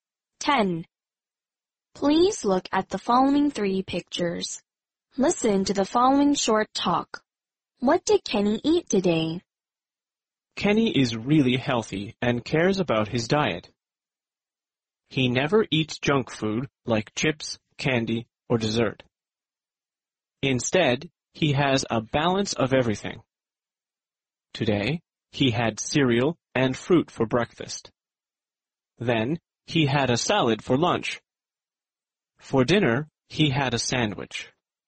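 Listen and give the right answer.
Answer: Cereal and fruit, a salad, and a sandwich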